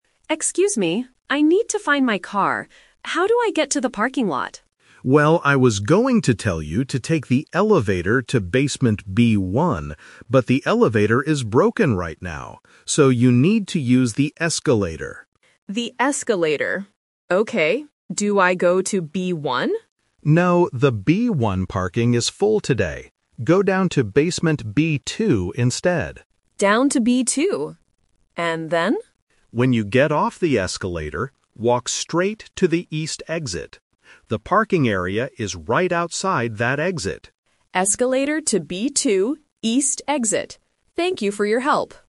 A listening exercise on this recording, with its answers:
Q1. Why doesn't the shopper use the elevator?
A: Because it is broken right now.

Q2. Which floor should the shopper go to?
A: Basement B2.

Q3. Where is the parking area located?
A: At the East exit.

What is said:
Shopper: Excuse me, I need to find my car. How do I get to the parking lot?
Security Guard: Well, I was going to tell you to take the elevator to basement B1, but the elevator is broken right now. So, you need to use the escalator.
Shopper: The escalator. Okay. Do I go to B1?
Security Guard: No, the B1 parking is full today. Go down to basement B2 instead.
Shopper: Down to B2. And then?
Security Guard: When you get off the escalator, walk straight to the East exit. The parking area is right outside that exit.